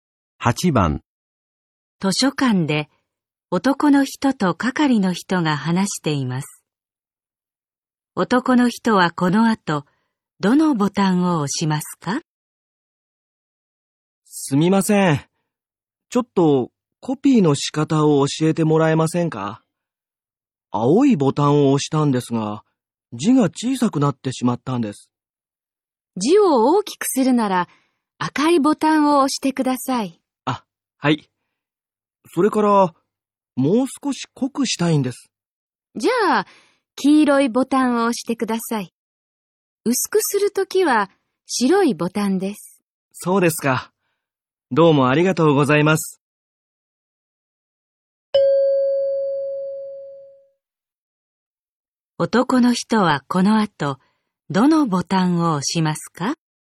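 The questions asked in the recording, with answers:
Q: 男の人はこの後、どのボタンを押しますか?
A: 赤いボタンと黄色いボタン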